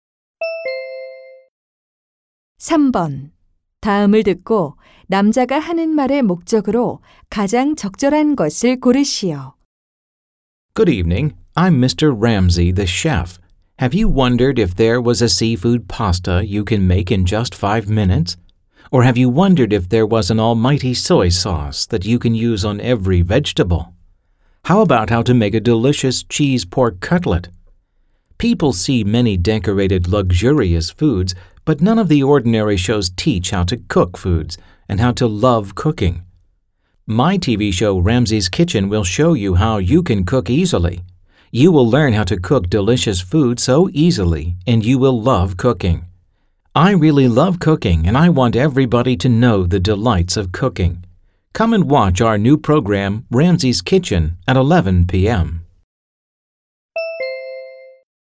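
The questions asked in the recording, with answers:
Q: 다음을 듣고 남자가 하는 말의 목적으로 가장 적절한 것을 고르시오.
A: 새 요리 TV 프로그램 Ramsay's Kitchen을 홍보하려고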